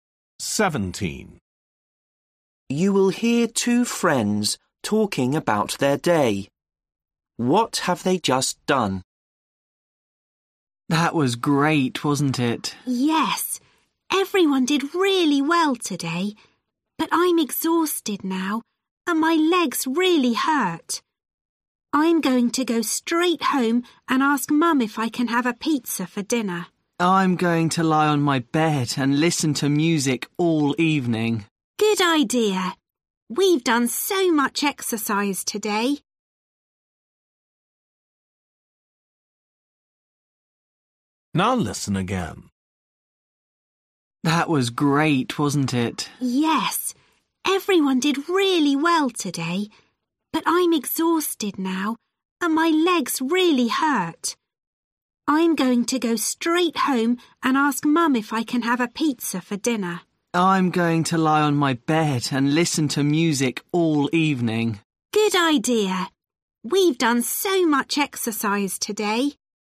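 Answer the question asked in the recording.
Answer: Done a lot of exercise (sport)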